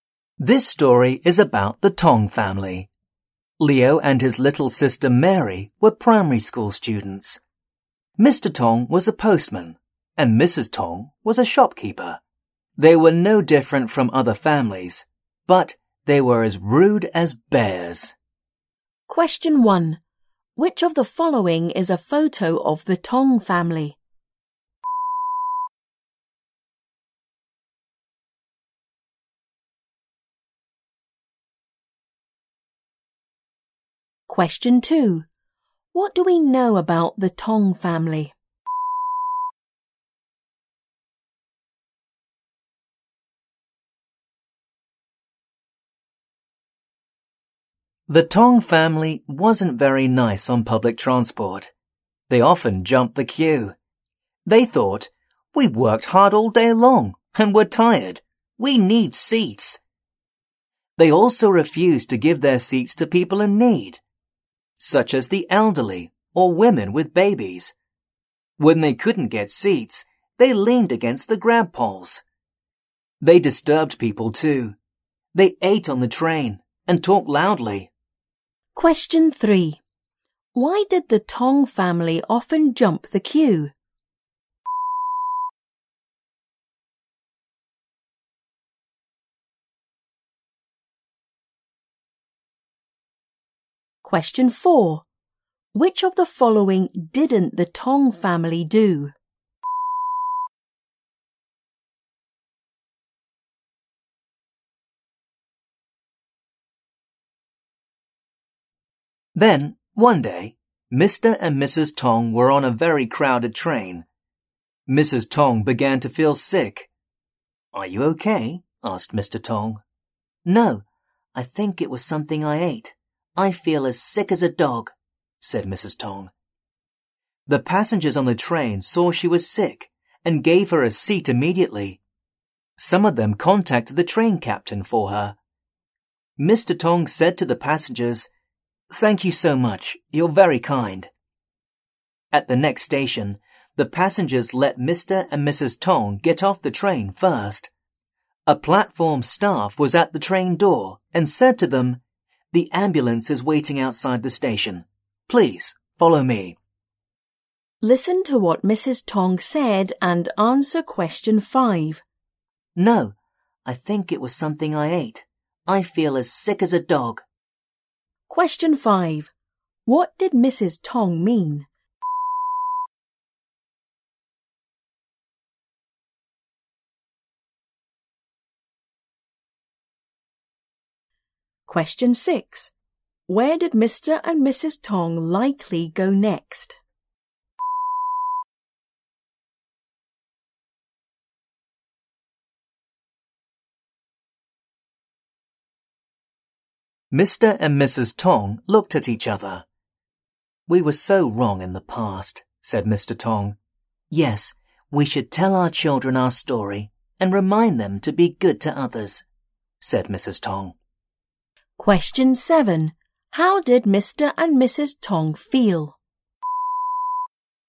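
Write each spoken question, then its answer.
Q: Why did the Tong family often jump the queue?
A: They had worked hard all day, were tired and needed seats.

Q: What did Mrs. Tong mean?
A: She felt very sick.

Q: Where did Mr. and Mrs. Tong likely go next?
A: To the hospital (by ambulance).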